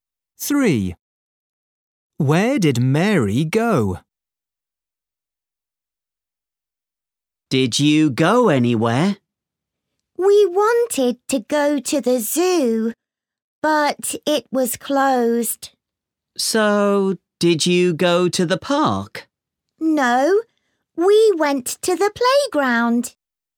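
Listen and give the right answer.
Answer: the playground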